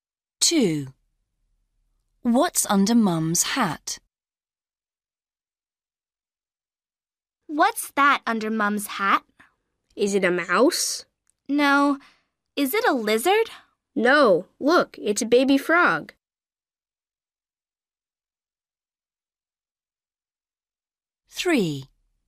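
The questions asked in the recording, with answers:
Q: What's under Mum's hat?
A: A baby frog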